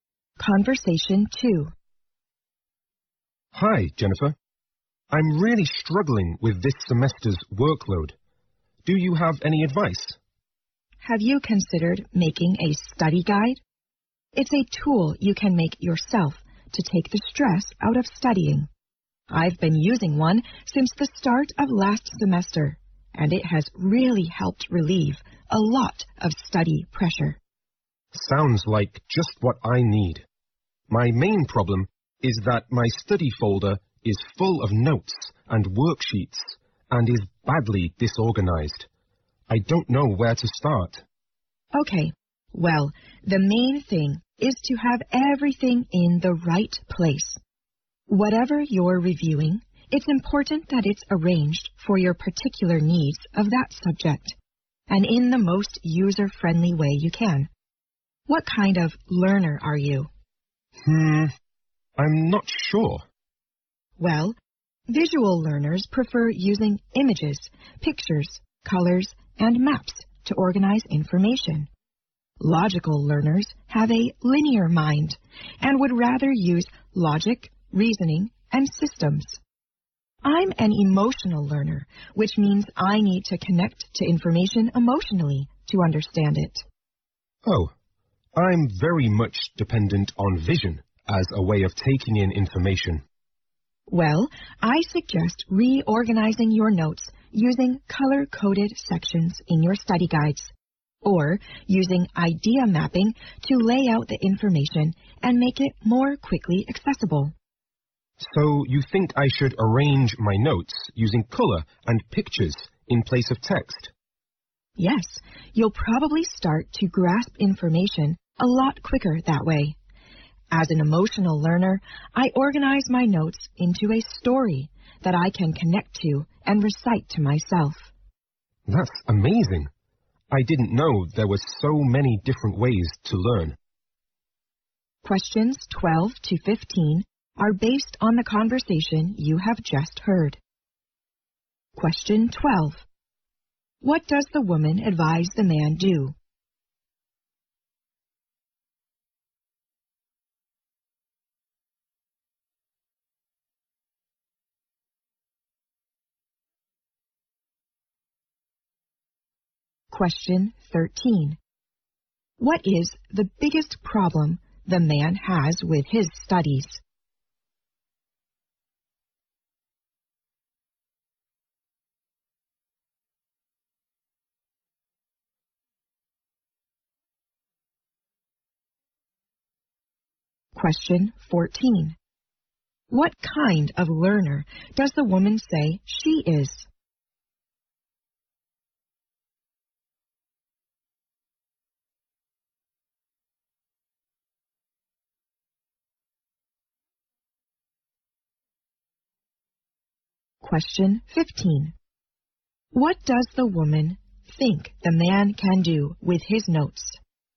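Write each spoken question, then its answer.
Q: What does the woman advise the man do?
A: Make a study guide.

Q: What is the biggest problem the man has with his studies?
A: His notes and worksheets are badly disorganized.

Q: What kind of learner does the woman say she is?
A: An emotional learner.

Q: What does the woman think the man can do with his notes?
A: Reorganize them using color and pictures instead of text.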